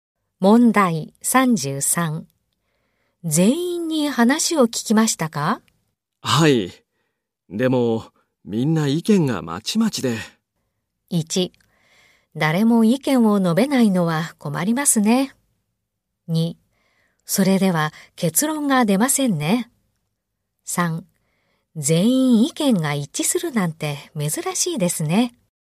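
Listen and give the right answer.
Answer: 2: それでは結論が出ませんね。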